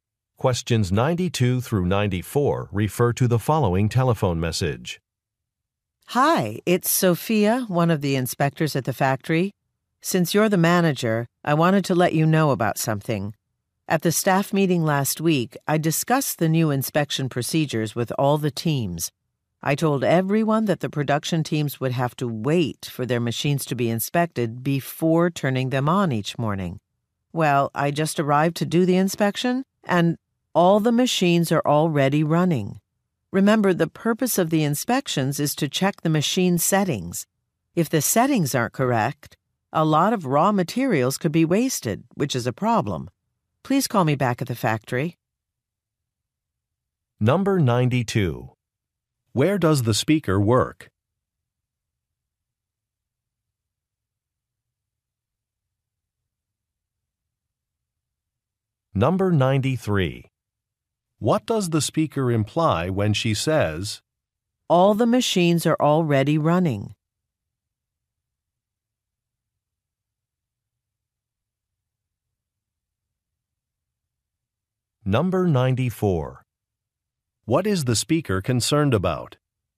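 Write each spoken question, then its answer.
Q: Where does the speaker work?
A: At a factory

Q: What does the speaker imply when she says,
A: The teams did not follow the new inspection procedure

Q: What is the speaker concerned about?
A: Wasting raw materials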